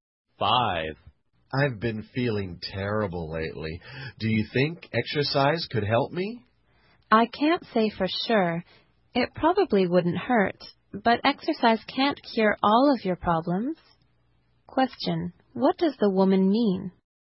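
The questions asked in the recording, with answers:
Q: What does the woman mean?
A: Exercise might help, but it can't cure all his problems.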